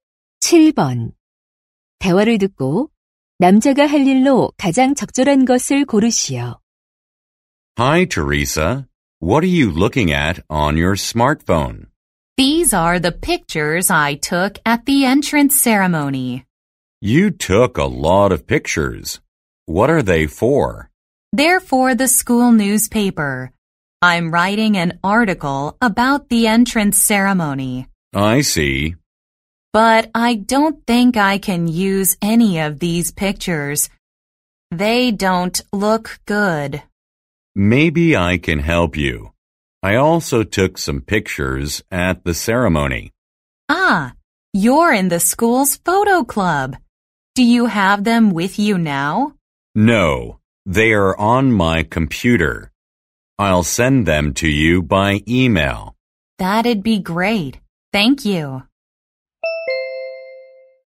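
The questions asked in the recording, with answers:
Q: 대화를 듣고 남자가 할 일로 가장 적절한 것을 고르시오.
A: 이메일로 사진 보내기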